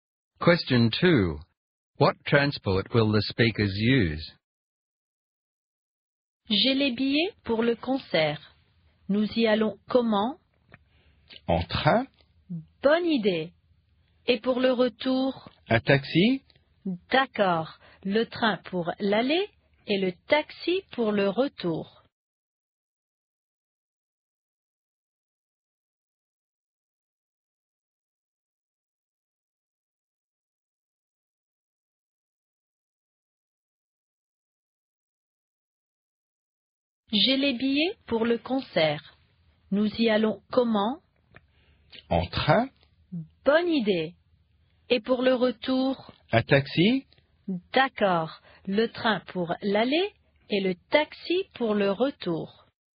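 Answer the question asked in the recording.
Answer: Train to go to the concert and taxi to return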